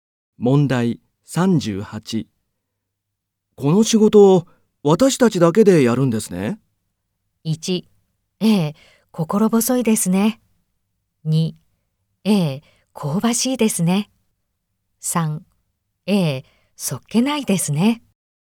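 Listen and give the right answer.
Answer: 1: ええ、心細いですね。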